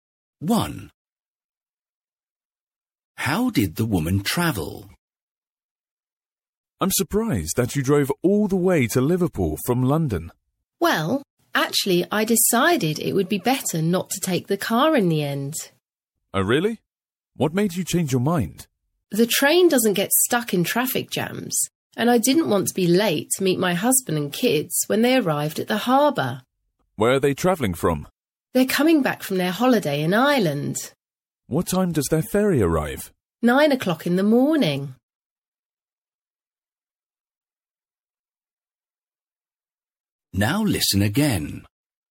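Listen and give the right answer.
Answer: By train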